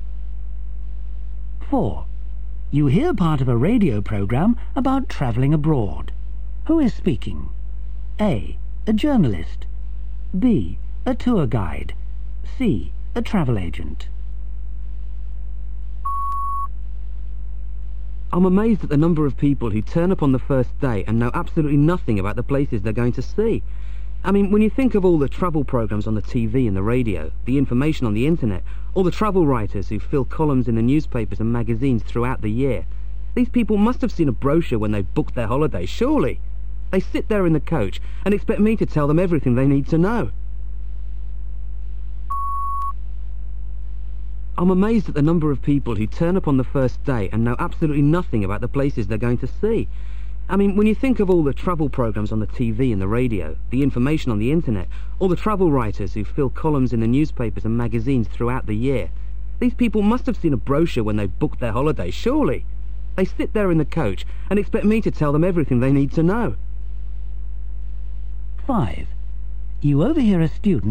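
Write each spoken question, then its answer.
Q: Who is speaking?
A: B: A tour guide.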